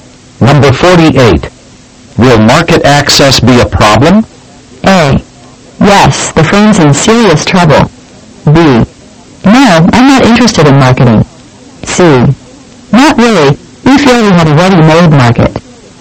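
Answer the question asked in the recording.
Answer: C: Not really. We feel we have a ready-made market.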